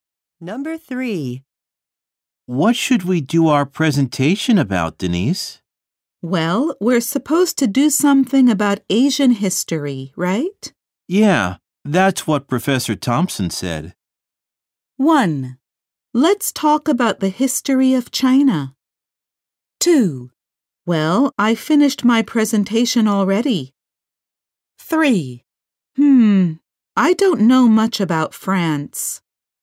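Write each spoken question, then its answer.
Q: Yeah, that's what Professor Thompson said.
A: 1: Let's talk about the history of China.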